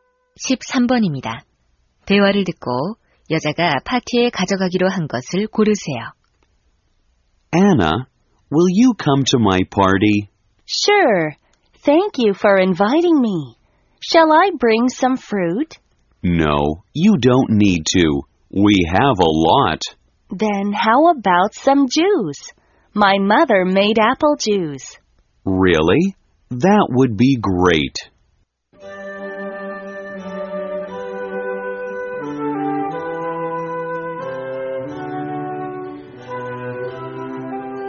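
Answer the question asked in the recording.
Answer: 사과 주스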